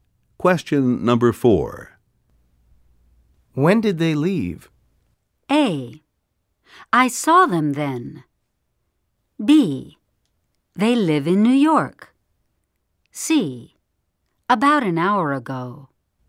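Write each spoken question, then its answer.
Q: When did they leave?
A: C: About an hour ago.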